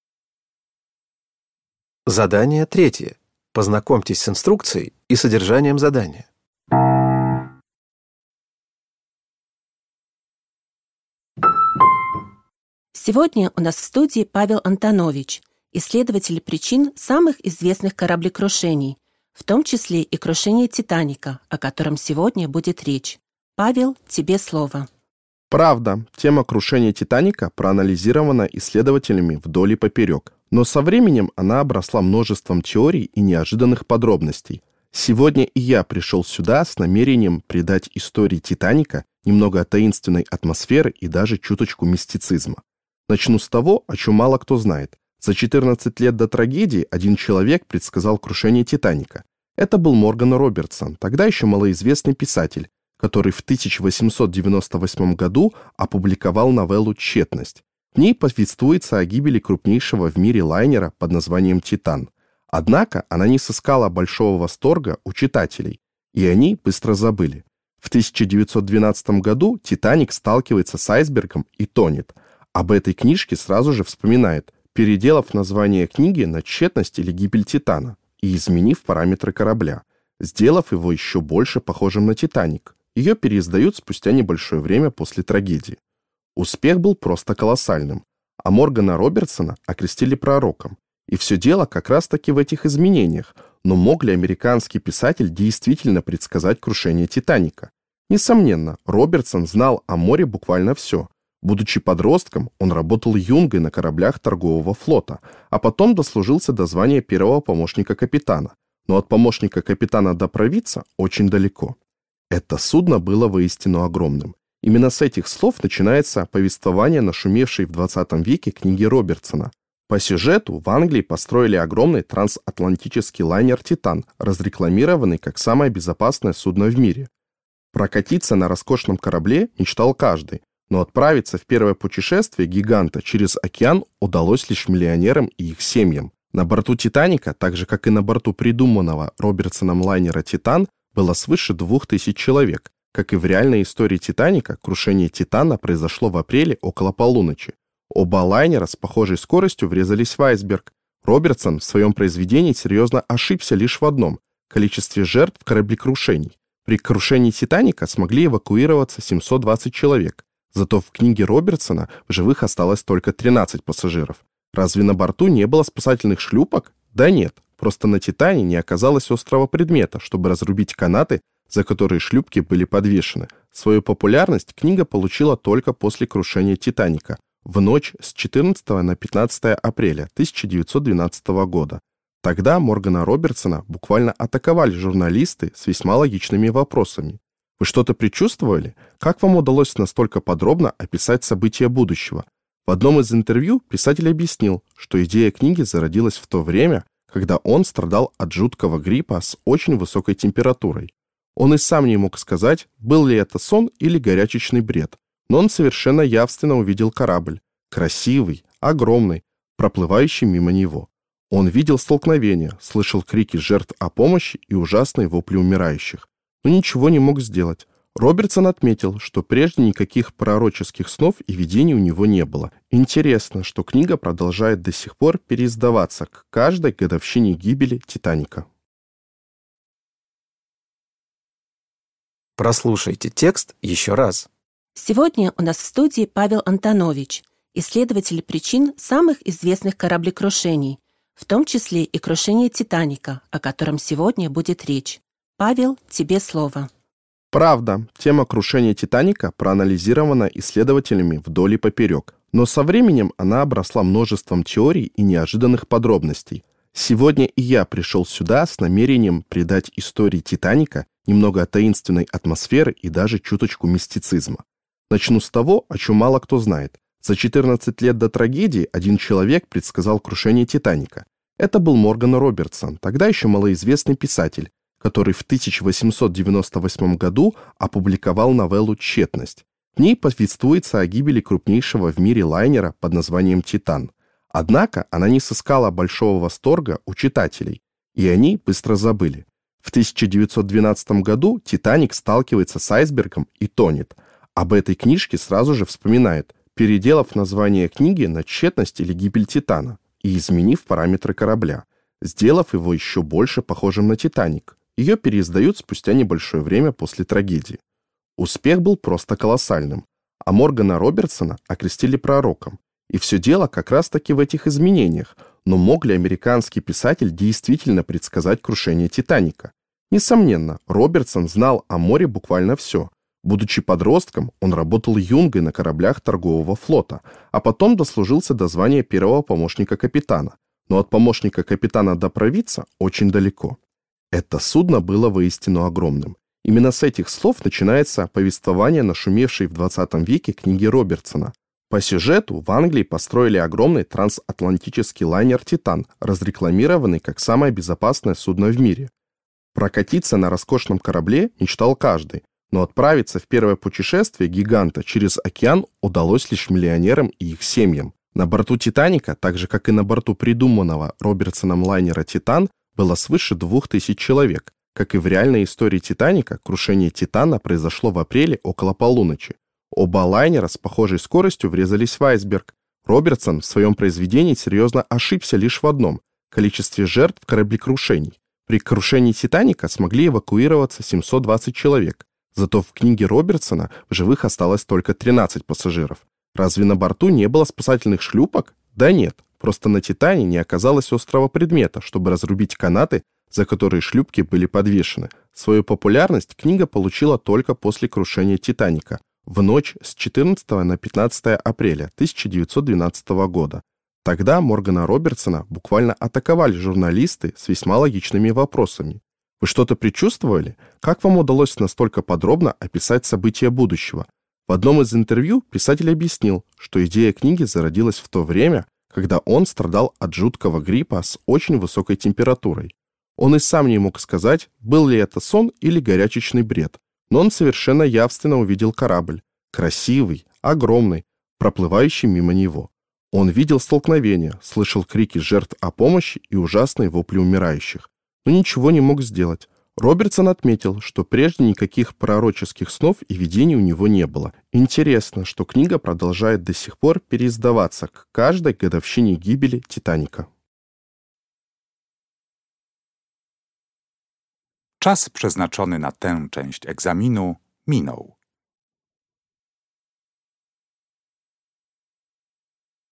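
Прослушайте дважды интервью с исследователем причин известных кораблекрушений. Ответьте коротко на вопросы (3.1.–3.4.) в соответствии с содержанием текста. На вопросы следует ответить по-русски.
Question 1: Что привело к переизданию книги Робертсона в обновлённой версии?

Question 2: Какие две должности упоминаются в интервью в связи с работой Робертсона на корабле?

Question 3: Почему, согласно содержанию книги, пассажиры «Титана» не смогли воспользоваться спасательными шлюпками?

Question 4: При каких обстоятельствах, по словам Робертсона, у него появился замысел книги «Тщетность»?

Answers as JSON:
{"1": "Крушение «Титаника» в 1912 году", "2": "Юнга и первый помощник капитана", "3": "На корабле не оказалось острого предмета, чтобы разрубить канаты, на которых висели шлюпки", "4": "Когда он болел тяжёлым гриппом с очень высокой температурой (во сне или в бреду)"}

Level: dwujęzyczny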